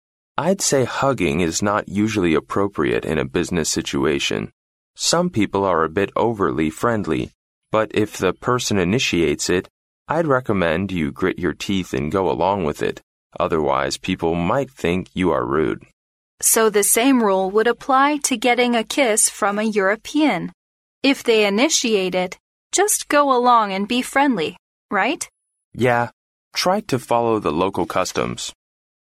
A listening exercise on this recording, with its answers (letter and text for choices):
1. Which saying can describe the situations in the conversation?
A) A friend in need is a friend indeed.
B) Gentleness and kindness conquer at last.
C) Two is company, but three is none.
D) When in Rome, do as the Romans do.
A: D) When in Rome, do as the Romans do.

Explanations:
对话中男士说虽然拥抱在商务场合中不太合适,但如果有人这么做了,最好还是跟着做,最后还提到"Try to follow the local customs"。由此可知这个对话讨论的主要话题是"入乡随俗"。因此D项正确。

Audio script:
M: I'd say hugging is not usually appropriate in a business situation. Some people are a bit overly friendly. But if the person initiates it, I'd recommend you grit your teeth and go along with it, otherwise people might think you are rude.
W: So the same rule would apply to getting a kiss from a European: if they initiate it, just go along and be friendly, right?
M: Yeah. Try to follow the local customs.

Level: C类